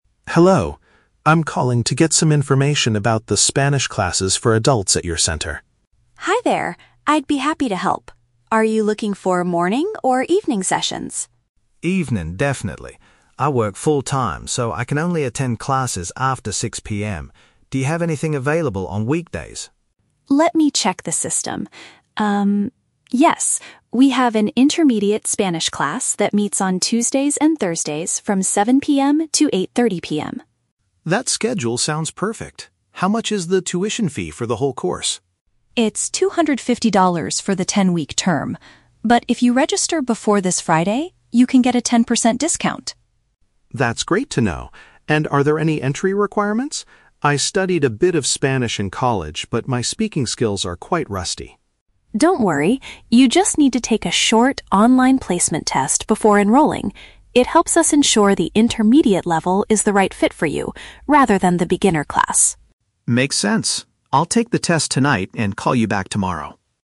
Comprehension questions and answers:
Listen to the conversation between a working adult and an education center receptionist, and choose the correct answer (A, B, or C) for each question.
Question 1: Why does the man require an evening class?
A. He has a regular daytime job.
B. He wants to avoid the heavy morning traffic.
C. He is taking another training program during the day.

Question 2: What is the condition for receiving a cheaper course price?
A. Paying the full amount in cash at the center.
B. Committing to the entire ten-week study period.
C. Signing up by a specific day of the week.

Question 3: What must the man do before he can officially join the program?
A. Submit his previous college transcripts.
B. Complete an assessment of his current language skills.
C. Attend a trial lesson with the beginner group.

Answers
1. A
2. C
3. B

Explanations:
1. The Key: Mark says, "I work full-time, so I can only attend classes after 6 PM." Option A paraphrases "work full-time" as having a "regular daytime job". The Trap: Option (C) is a trap. He is busy during the day, but it's because of work, not "another training program". Option (B) is a logical reason for wanting evening classes, but it is not mentioned in the audio.
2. The Key: Claire mentions that to get a 10% discount (a cheaper course price), he must "register before this Friday". Option C paraphrases "register before this Friday" as "signing up by a specific day of the week". The Trap: Option (B) contains the words "ten-week", which is the length of the term, but committing to it is not the condition for the discount. Option (A) is not mentioned at all.
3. The Key: Claire tells him he needs to "take a short, online placement test before enrolling". Option B paraphrases "placement test" as an "assessment of his current language skills". The Trap: Option (A) is a trap. Mark mentions he "studied a bit of Spanish in college", but he does not need to submit transcripts. Option (C) mentions the "beginner" group, but this is a trap because the test is to ensure he doesn't need the beginner class.

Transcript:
Mark: Hello. I'm calling to get some information about the Spanish classes for adults at your center.
Claire: Hi there. I'd be happy to help. Are you looking for morning or evening sessions?
Mark: Evening, definitely. I work full-time, so I can only attend classes after 6 PM. Do you have anything available on weekdays?
Claire: Let me check the system. We have an intermediate Spanish class that meets on Tuesdays and Thursdays from 7:00 PM to 8:30 PM.
Mark: That schedule sounds perfect. How much is the tuition fee for the whole course?
Claire: It's $250 for the ten-week term. But, if you register before this Friday, you can get a 10% discount.
Mark: That's great to know. And are there any entry requirements? I studied a bit of Spanish in college, but my speaking skills are quite rusty.
Claire: Don't worry. You just need to take a short, online placement test before enrolling. It helps us ensure the intermediate level is the right fit for you, rather than the beginner class.

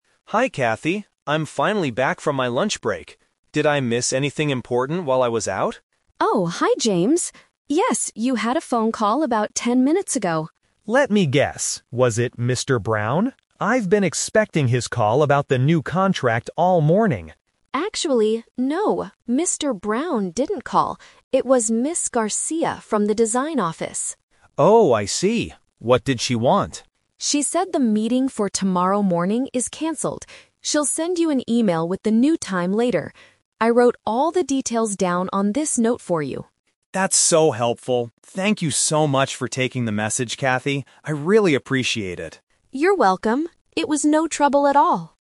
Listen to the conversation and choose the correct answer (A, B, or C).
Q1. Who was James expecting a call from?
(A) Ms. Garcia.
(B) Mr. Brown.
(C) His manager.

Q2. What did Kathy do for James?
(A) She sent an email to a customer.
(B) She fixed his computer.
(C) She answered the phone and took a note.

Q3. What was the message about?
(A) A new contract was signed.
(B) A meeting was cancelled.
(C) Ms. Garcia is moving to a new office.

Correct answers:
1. B
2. C
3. B

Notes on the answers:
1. James asks, "was it Mr. Brown? I've been expecting his call..." Trap: Option (A) is the person who actually called, but James was expecting Mr. Brown.
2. James thanks her for "taking the message" and Kathy says she wrote the details on a note. Trap: Option (A) is a trap because the word "email" is mentioned in the conversation, but Kathy didn't send it; Ms. Garcia will.
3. Kathy says, "the meeting for tomorrow morning is cancelled." Trap: Option (A) uses the word "contract" which James mentioned earlier, but it is not part of the actual message.

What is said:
James: Hi Kathy, I'm finally back from my lunch break. Did I miss anything important while I was out?
Kathy: Oh, hi James. Yes, you had a phone call about ten minutes ago.
James: Let me guess... was it Mr. Brown? I've been expecting his call about the new contract all morning.
Kathy: Actually, no. Mr. Brown didn't call. It was Ms. Garcia from the design office.
James: Oh, I see. What did she want?
Kathy: She said the meeting for tomorrow morning is cancelled. She'll send you an email with the new time later. I wrote all the details down on this note for you.
James: That's so helpful! Thank you so much for taking the message, Kathy. I really appreciate it.

